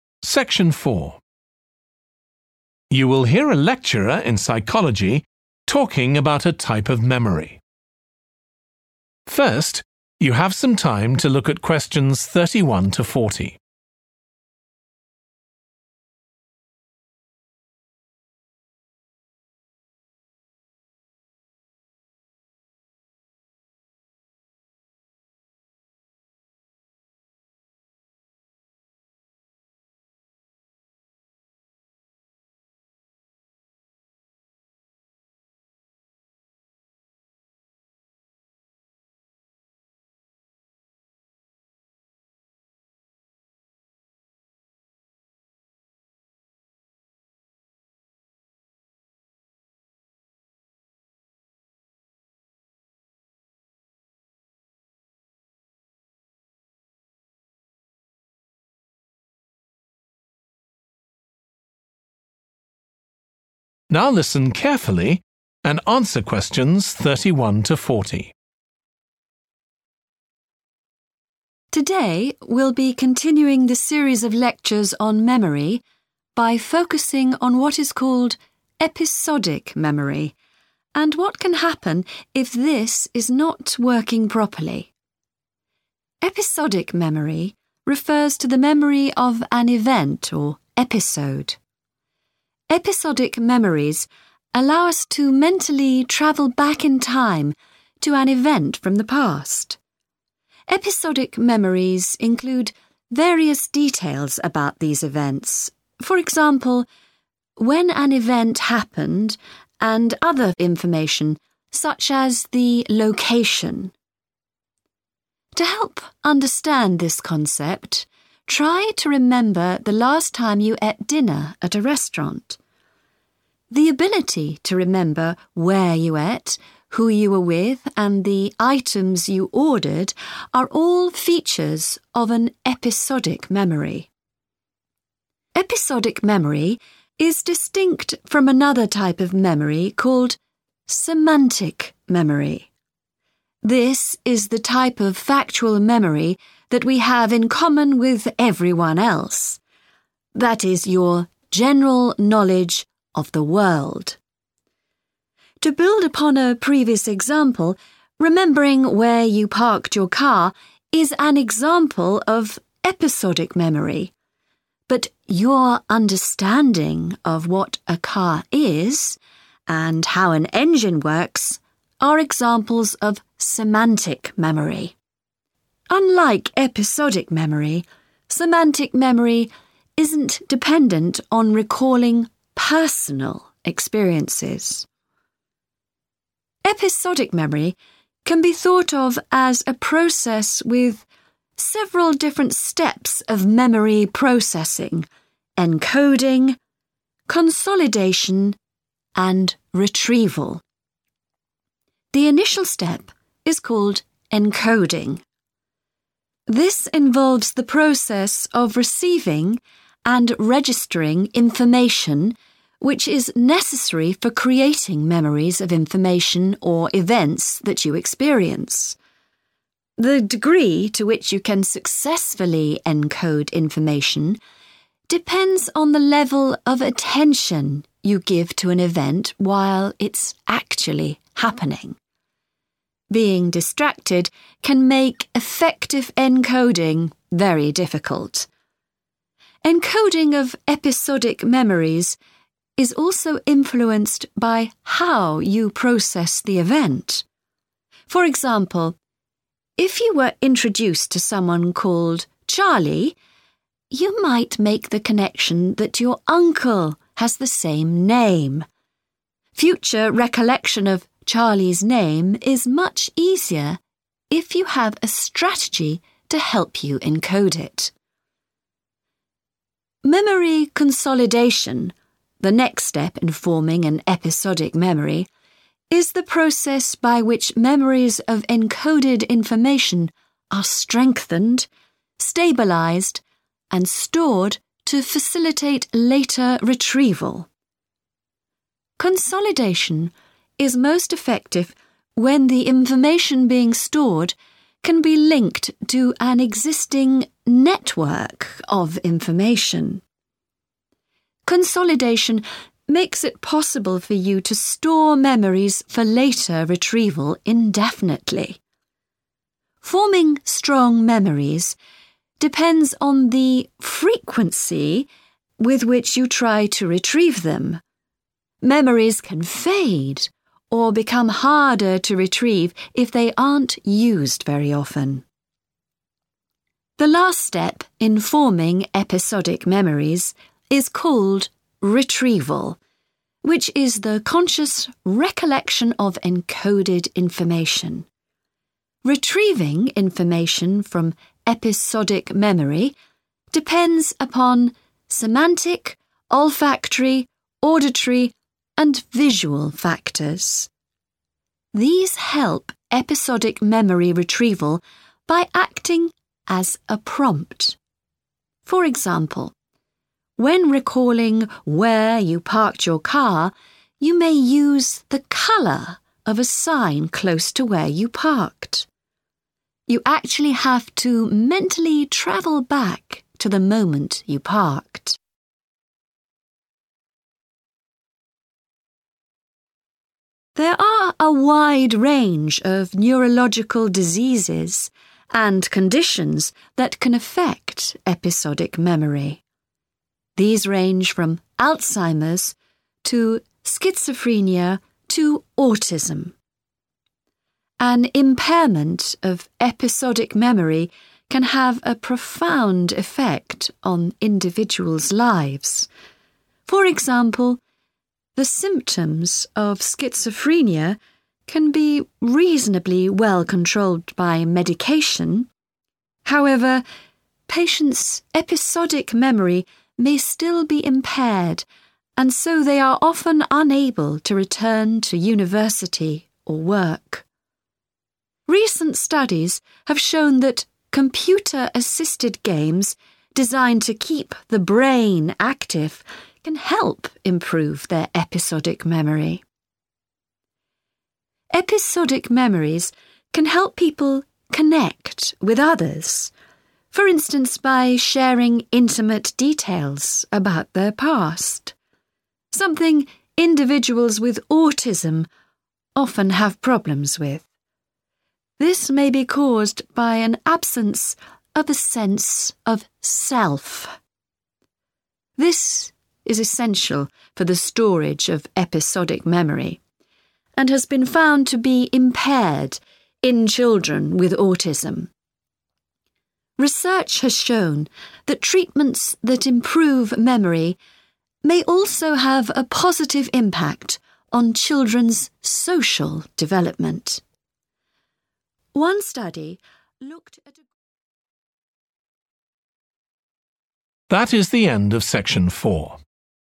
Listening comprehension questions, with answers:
Complete the notes below. Write ONE WORD ONLY for each answer.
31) the ability to recall details, e.g. the time and _____ of past events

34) the more _____ Given to an event, the more successfully it can be encoded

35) to remember a _____ , it is useful to have a strategy for encoding such information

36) most effective when memories can be added to a _____ Of related information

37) the _____ Of retrieval affects the strength of memories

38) memory retrieval often depends on using a prompt, e.g. the _____ Of an object near to the place where you left your car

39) games which stimulate the _____ have been found to help people with schizophrenia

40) children with autism may have difficulty forming episodic memories – possibly because their concept of the _____ may be absent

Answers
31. location
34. attention
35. name
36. network
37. frequency
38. colour / color
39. brain
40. self

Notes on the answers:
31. The transcript talks about remembering details like when an event happened and where it took place. Answer Explanation: The answer is 'location,' which refers to the specific place where an event occurred. Reason For Correctness: The correct answer is 'location' because in the given excerpt, it mentions that episodic memories include details like when an event happened and 'the location' of the event, indicating that remembering where something happened is crucial for episodic memory.
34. The transcript is saying that how well you remember something depends on how much you focus on it at the time it happens. Answer Explanation: The answer implies that giving attention to something is crucial for encoding it into memory. Reason For Correctness: The correct answer is 'attention' because the excerpt mentions that the success of encoding memories depends on the level of attention you give to an event. This shows that paying attention is essential for remembering details of past events.
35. The transcript talks about making connections between different things, like remembering someone's name by associating it with a relative who shares the same name. Answer Explanation: The answer 'name' refers to the piece of information that is being encoded or remembered, which in this case is 'Charlie's name.' Reason For Correctness: The correct answer is 'name' because the excerpt mentions remembering Charlie's name by forming a connection with someone who has the same name, emphasizing the importance of having a strategy to encode and recall specific information such as names.
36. Consolidation is most effective when the information being stored can be linked to an existing network of information. Excerpt/Transcript Explanation: The transcript tells us that memories are strengthened and stored most effectively when the information being stored can be connected to a system or group of related information. Answer Explanation: The answer refers to a network, which is a system of interconnected things or people. In this context, it means that memories are consolidated well when new information can be associated with an existing network of related information. Reason For Correctness: The correct answer aligns perfectly with the concept mentioned in the excerpt that memories are better consolidated when connected or linked to an existing network of information. It captures the essence of forming strong memories by integrating new information into a pre-existing system or network of knowledge.
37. Forming strong memories depends on the frequency with which you try to retrieve them. Excerpt/Transcript Explanation: The transcript is saying that the strength of memories you form depends on how often you try to remember them. Answer Explanation: The answer refers to how often you try to remember something. Reason For Correctness: The correct answer correlates with the excerpt as it highlights that forming strong memories involves the frequency of retrieval attempts. So, the more frequently you try to remember something, the stronger your memories can become.
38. The transcript explains that when you try to remember where you parked your car, you might think about the color of a sign nearby. This color helps you remember better where your car is. Answer Explanation: The answer 'colour' means the way something looks, like red, blue, or green. It is a way to describe how we see things. Reason For Correctness: The correct answer is 'colour' because it is used as a hint or prompt to help find the place where you parked your car. The transcript says that using the color of a sign can help you remember.
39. The transcript is saying that games on the computer that challenge the brain can help improve episodic memory. Answer Explanation: The answer refers to the 'brain', which is an essential part of the body that controls memory, thinking, and other functions. Reason For Correctness: The correct answer is 'brain' because the excerpt mentions computer-assisted games designed to keep the brain active, indicating that the brain plays a crucial role in improving episodic memory through such activities.
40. The transcript explains that individuals with autism may have difficulty sharing personal details about their past, possibly due to not having a strong sense of self. Answer Explanation: The answer refers to 'self,' which means one's own individual identity or unique characteristics. Reason For Correctness: The correct answer is 'self' because the excerpt suggests that a lack of a sense of self could be a reason why individuals with autism struggle to share personal information, impacting their episodic memory formation.

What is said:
Today, we'll be continuing the series of lectures on memory by focusing on what is called episodic memory and what can happen if this is not working properly.
Episodic memory refers to the memory of an event or 'episode'. Episodic memories allow us to mentally travel back in time to an event from the past. Episodic memories include various details about these events, for example, when an event happened and other information such as the location. To help understand this concept, try to remember the last time you ate dinner at a restaurant. The ability to remember where you ate, who you were with and the items you ordered are all features of an episodic memory.
Episodic memory is distinct from another type of memory called semantic memory. This is the type of factual memory that we have in common with everyone else – that is your general knowledge of the world. To build upon a previous example, remembering where you parked your car is an example of episodic memory, but your understanding of what a car is and how an engine works are examples of sematic memory. Unlike episodic memory, semantic memory isn't dependent on recalling personal experiences.
Episodic memory can be thought of as a process with several different steps of memory processing: encoding, consolidation and retrieval.
The initial step is called encoding. This involves the process of receiving and registering information, which is necessary for creating memories of information or events that you experience. The degree to which you can successfully encode information depends on the level of attention you give to an event while it's actually happening. Being distracted can make effective encoding very difficult. Encoding of episodic memories is also influenced by how you process the event. For example, if you were introduced to someone called Charlie, you might make the connection that your uncle has the same name. Future recollection of Charlie's name is much easier if you have a strategy to help you encode it.
Memory consolidation, the next step in forming an episodic memory, is the process by which memories of encoded information are strengthened, stabilised and stored to facilitate later retrieval. Consolidation is most effective when the information being stored can be linked to an existing network of information. Consolidation makes it possible for you to store memories for later retrieval indefinitely. Forming strong memories depends on the frequency with which you try to retrieve them. Memories can fade or become harder to retrieve if they aren't used very often.
The last step in forming episodic memories is called retrieval, which is the conscious recollection of encoded information. Retrieving information from episodic memory depends upon semantic, olfactory, auditory and visual factors. These help episodic memory retrieval by acting as a prompt. For example, when recalling where you parked your car you may use the colour of a sign close to where you parked. You actually have to mentally travel back to the moment you parked.
There are a wide range of neurological diseases and conditions that can affect episodic memory. These range from Alzheimer's to schizophrenia to autism. An impairment of episodic memory can have a profound effect on individuals' lives. For example, the symptoms of schizophrenia can be reasonably well controlled by medication; however, patients' episodic memory may still be impaired and so they are often unable to return to university or work. Recent studies have shown that computer- assisted games designed to keep the brain active can help improve their episodic memory.
Episodic memories can help people connect with others, for instance by sharing intimate details about their past; something individuals with autism often have problems with. This may be caused by an absence of a sense of self. This is essential for the storage of episodic memory, and has been found to be impaired in children with autism. Research has shown that treatments that improve memory may also have a positive impact on children's social development.
One study looked at a ...